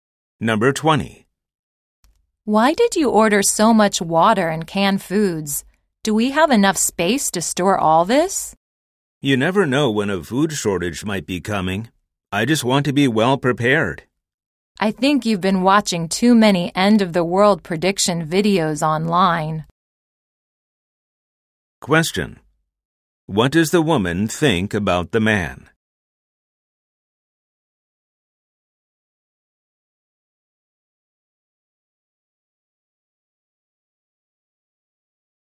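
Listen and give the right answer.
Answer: He has watched too many end-of-the-world videos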